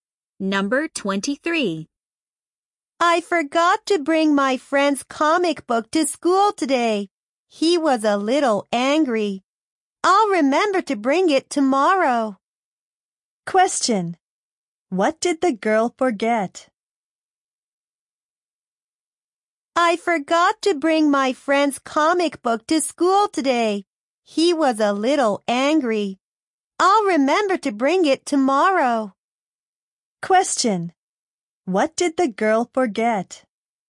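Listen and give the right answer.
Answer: Her friend's comic book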